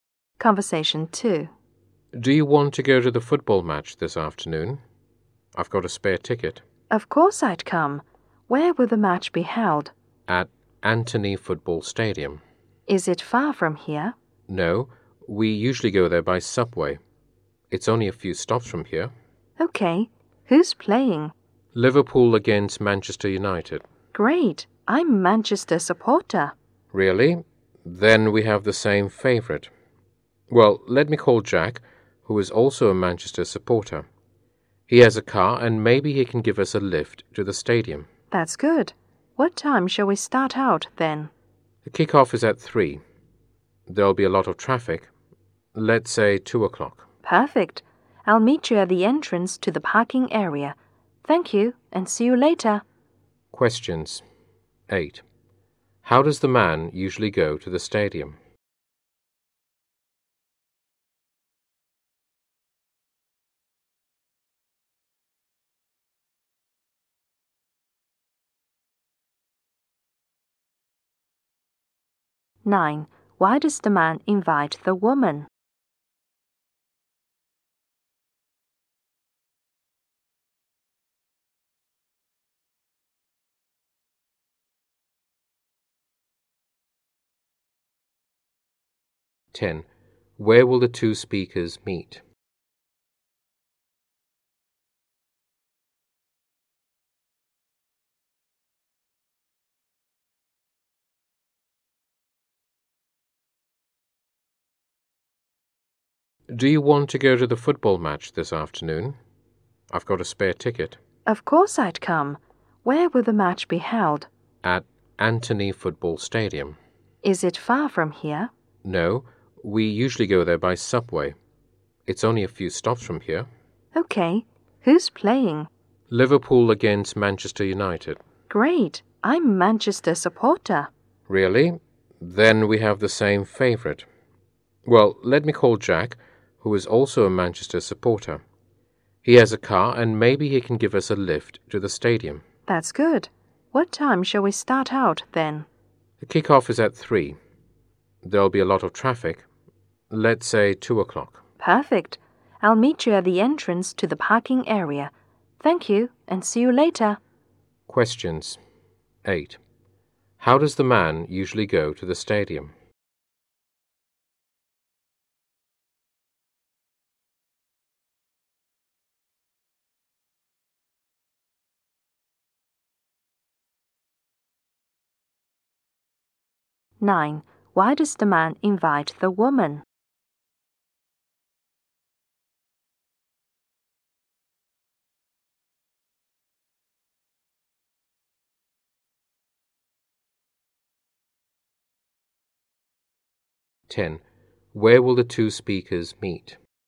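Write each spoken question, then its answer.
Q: How does the man usually go to the stadium?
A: By subway

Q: Why does the man invite the woman?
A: He has a spare ticket

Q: Where will the two speakers meet?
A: At the entrance to the parking area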